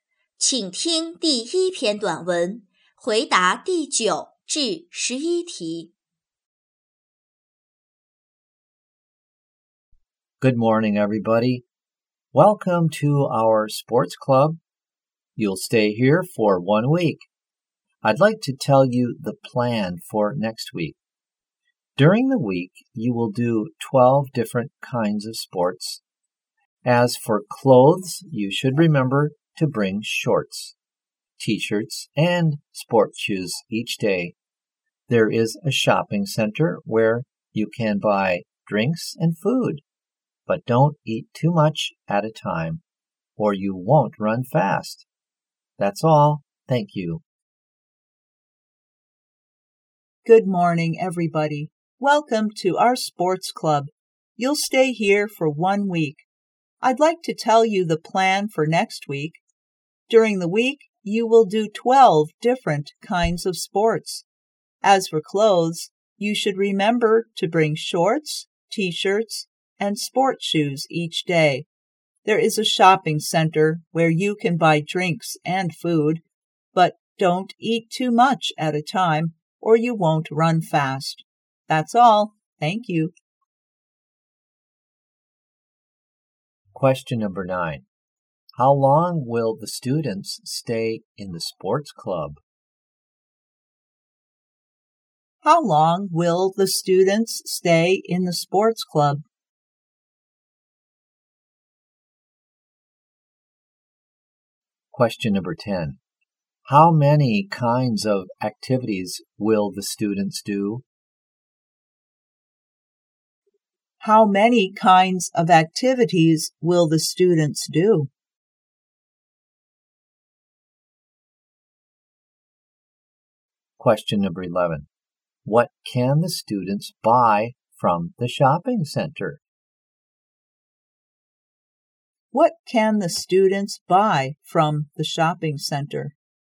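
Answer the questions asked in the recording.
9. One week
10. 12
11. Drinks and food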